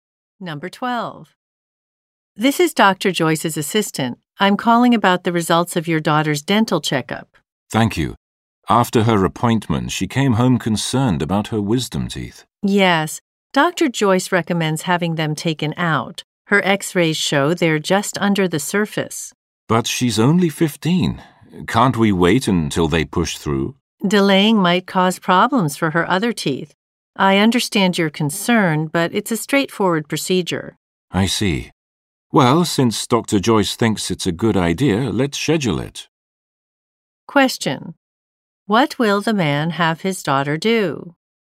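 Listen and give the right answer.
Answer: Have her wisdom teeth taken out.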